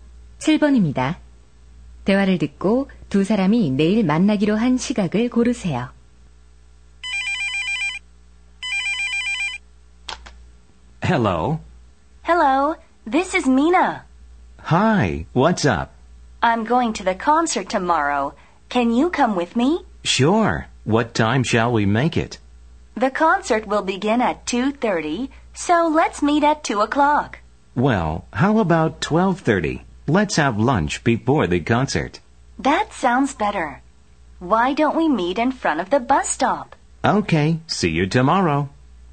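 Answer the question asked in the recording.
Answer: 12시 30분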